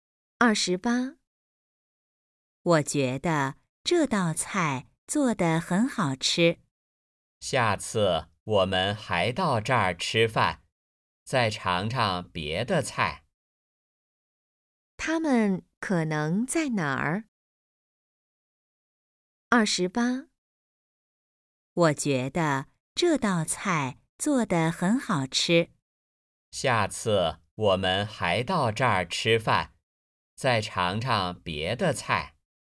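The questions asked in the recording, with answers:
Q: 他们可能在哪儿?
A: 饭馆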